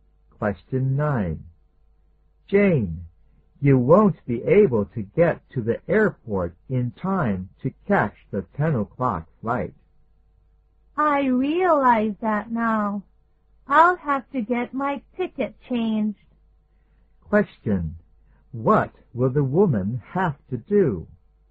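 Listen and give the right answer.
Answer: Get her ticket changed (take a later flight).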